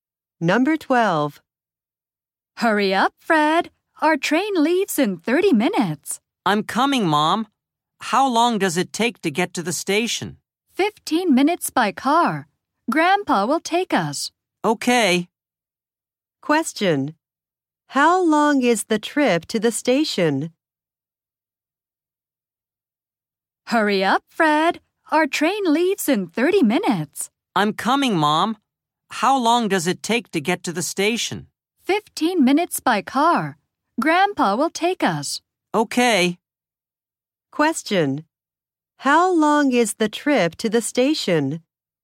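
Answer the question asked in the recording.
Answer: 15 minutes by car.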